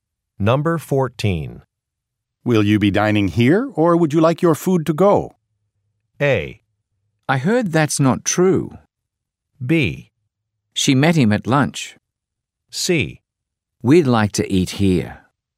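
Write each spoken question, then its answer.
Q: Will you be dining here, or would you like your food to go?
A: C: We'd like to eat here.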